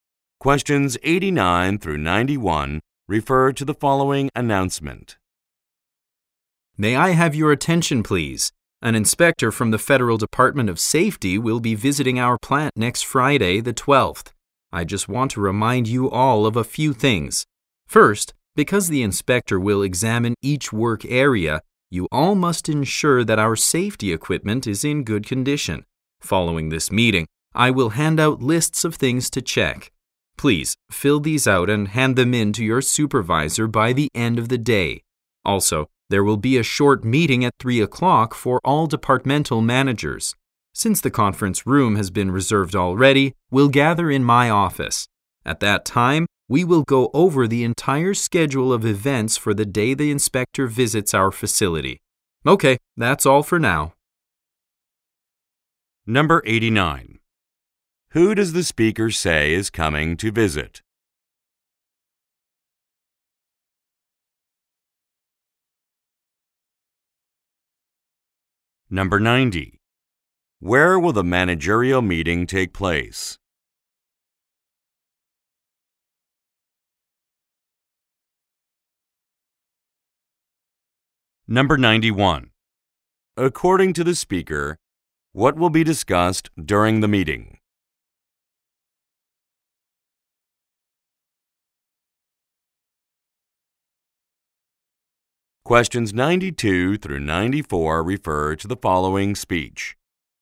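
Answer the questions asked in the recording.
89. An inspector from the Federal Department of Safety
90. In the speaker's office
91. The schedule of events for the inspection day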